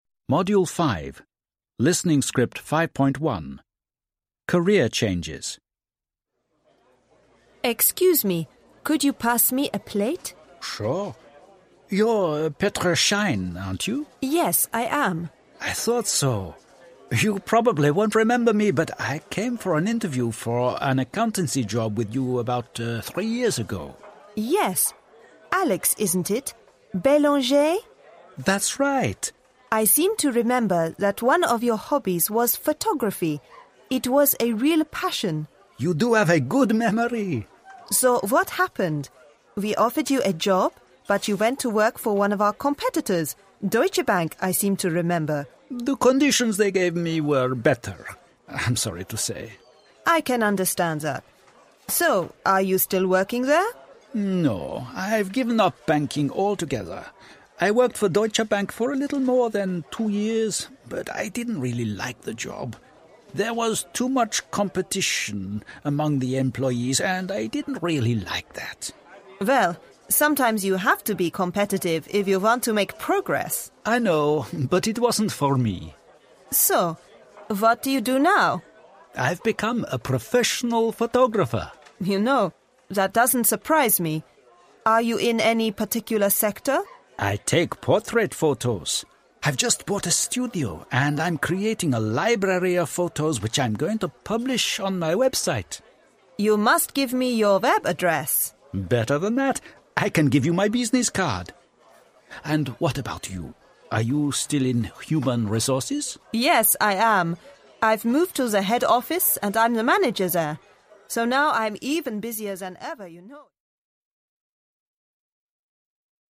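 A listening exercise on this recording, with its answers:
Listen and answer questions:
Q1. What job did Alex apply for about three years ago?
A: An accountancy job

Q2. What is Alex's hobby?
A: Photography

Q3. Did Petra offer Alex a job after interview?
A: Yes

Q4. Did Alex work for Petra's company finally? If no, which company did he work for? What's the reason?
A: No; Deutsche Bank, because the conditions were better

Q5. Is Alex still working there currently? If no, what's the reason?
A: No; he didn't like the job because there was too much competition among employees

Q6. What does Alex do now?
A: He is a professional photographer

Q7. What particular sector does Alex work for?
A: Portrait photos

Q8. What is Alex's next plan?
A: To create a library of photos and publish them on his website

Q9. Is Petra still working in HR?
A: Yes

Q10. Has Petra got a promotion?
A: Yes, she is now the manager at the head office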